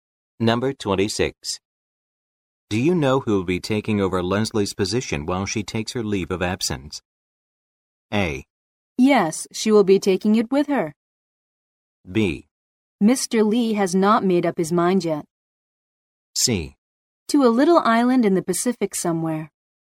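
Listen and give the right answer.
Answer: B: Mr. Lee has not made up his mind yet.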